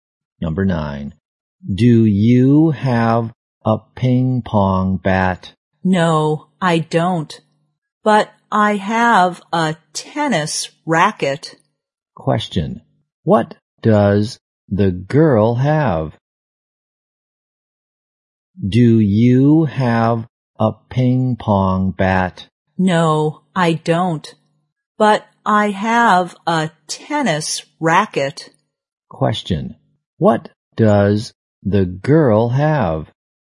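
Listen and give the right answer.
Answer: A tennis racket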